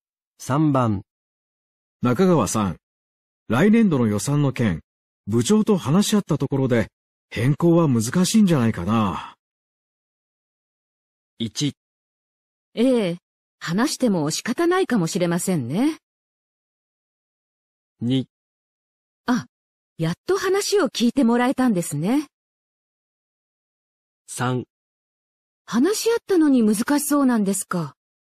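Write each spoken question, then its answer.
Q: 中川さん、来年度の予算の件、部長と話し合ったところで、変更は難しいんじゃないかな。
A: 1: ええ、話しても仕方ないかもしれませんね。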